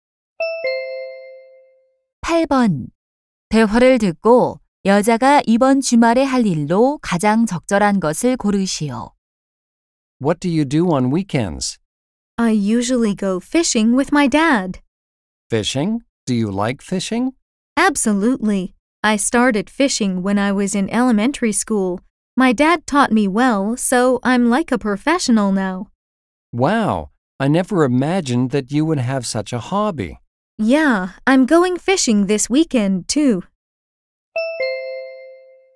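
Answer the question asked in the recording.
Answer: 낚시하러 가기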